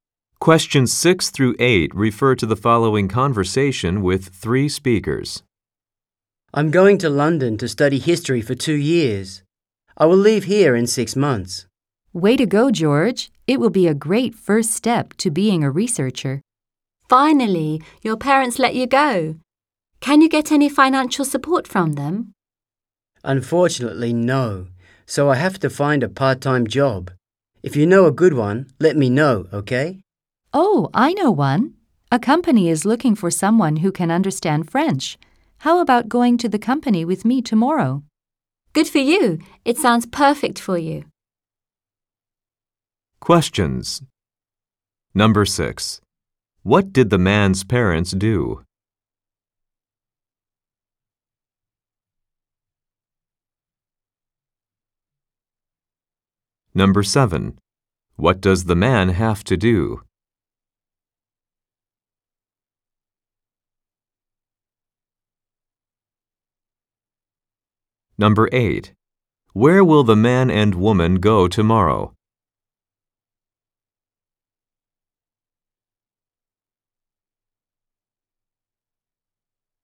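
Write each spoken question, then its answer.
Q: What did the man's parents do?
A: They let him go to London to study.

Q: What does the man have to do?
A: Find a part-time job.

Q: Where will the man and woman go tomorrow?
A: To a company looking for someone who understands French.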